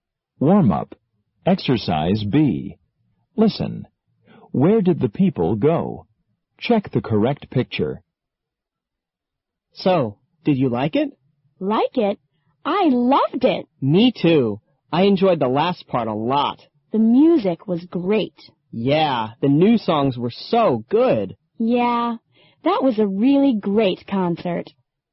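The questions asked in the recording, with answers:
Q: Where did the people go?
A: To a concert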